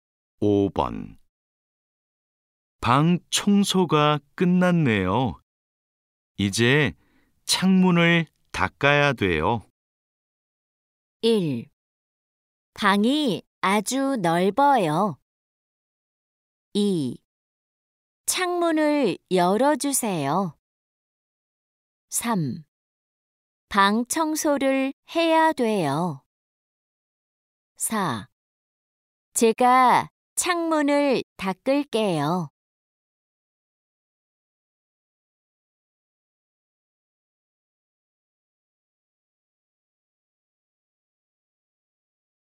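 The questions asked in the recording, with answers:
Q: 방 청소가 끝났네요. 이제 창문을 닦아야 돼요.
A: 4: 제가 창문을 닦을게요.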